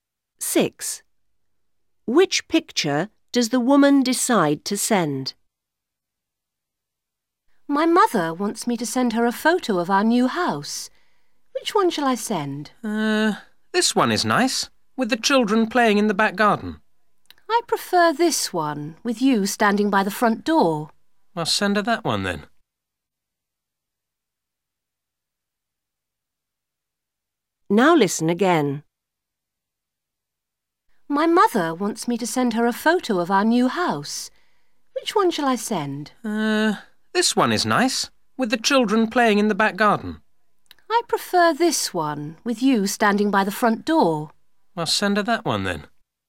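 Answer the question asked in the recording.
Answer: The one with the woman standing by the front door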